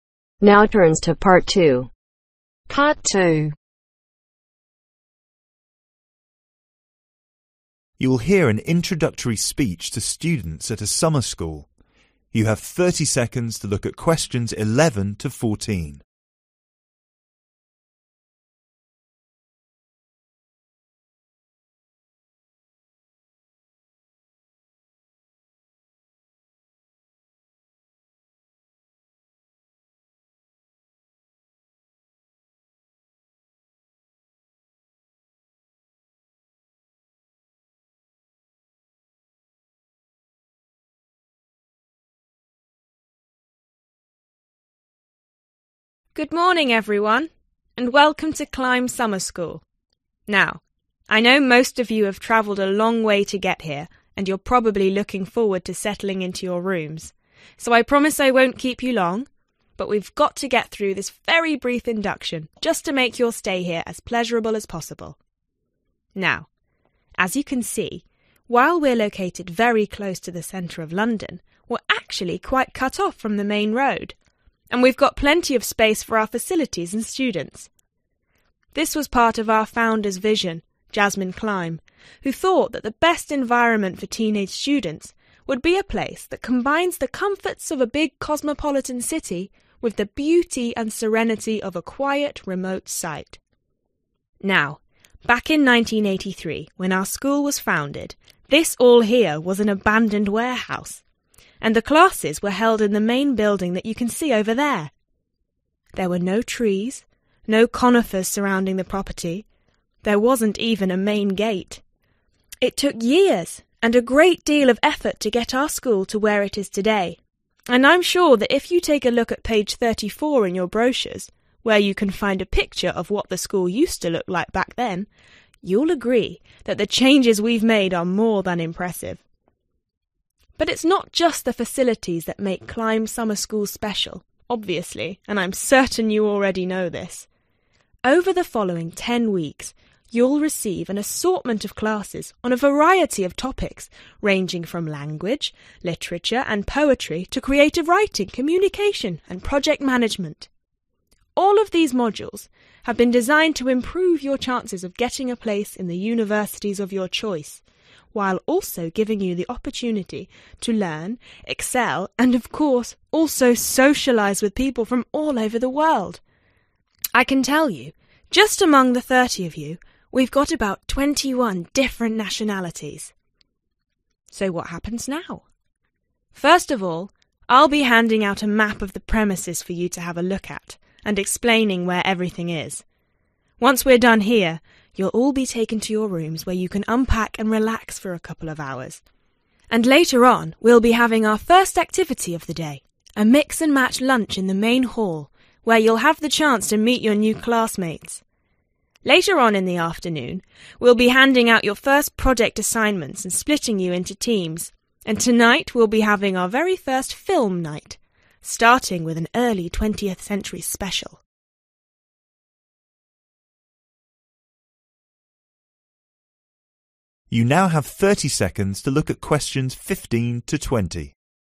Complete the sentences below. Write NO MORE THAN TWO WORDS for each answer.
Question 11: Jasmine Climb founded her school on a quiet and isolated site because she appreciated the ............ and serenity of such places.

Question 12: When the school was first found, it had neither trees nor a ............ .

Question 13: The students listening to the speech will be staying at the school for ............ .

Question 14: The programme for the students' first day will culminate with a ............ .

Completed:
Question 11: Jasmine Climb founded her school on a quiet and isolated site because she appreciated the Beauty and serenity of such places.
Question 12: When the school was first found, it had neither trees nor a Main Gate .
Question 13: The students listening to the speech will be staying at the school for Ten weeks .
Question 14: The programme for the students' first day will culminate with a Film night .